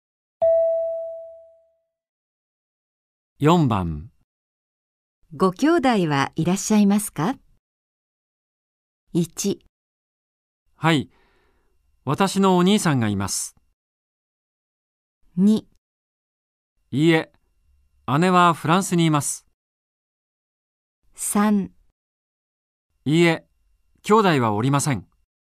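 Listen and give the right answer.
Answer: 3: いいえ、兄弟はおりません。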